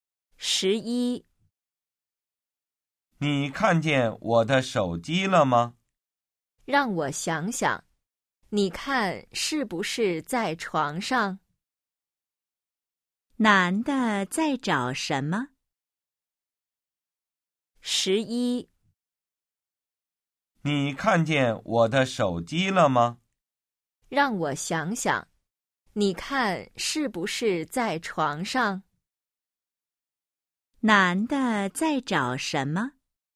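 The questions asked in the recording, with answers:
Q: 男的在找什么?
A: 手机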